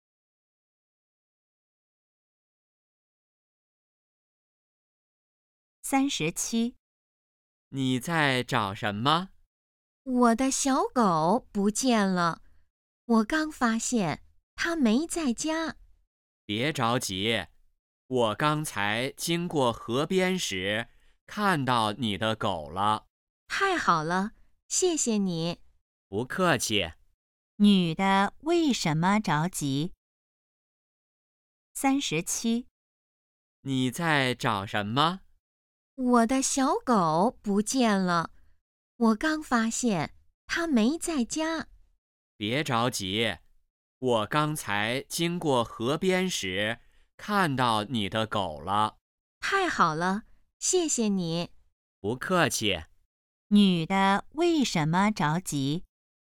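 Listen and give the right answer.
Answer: 小狗不见了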